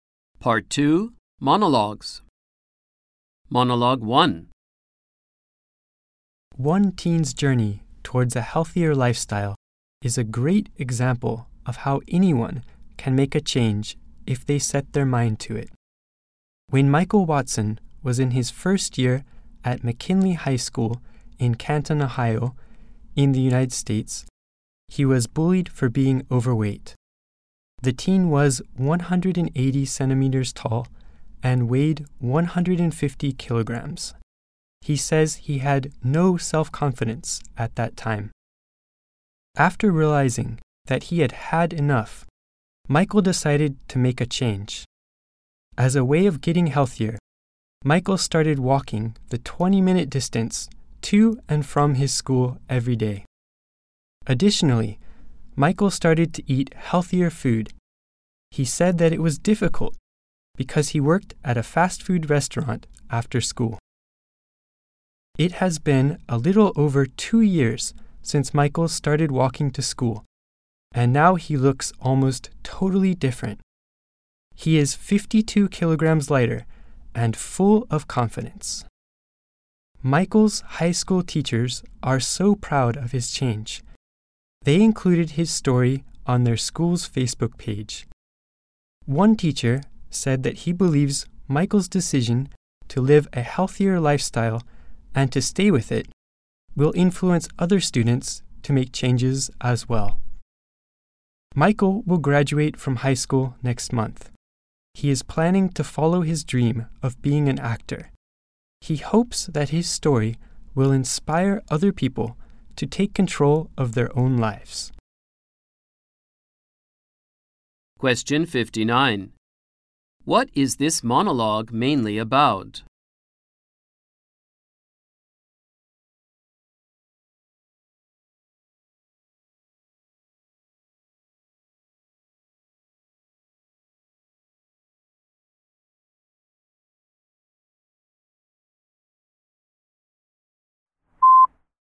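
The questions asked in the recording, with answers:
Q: What is this monologue mainly about?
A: A teen who lost weight and became healthier and more confident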